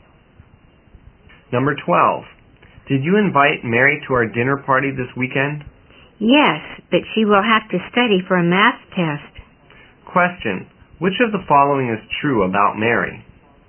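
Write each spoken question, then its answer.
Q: which of the following is true about Mary?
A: She has to study for a math test, so she may not come to the party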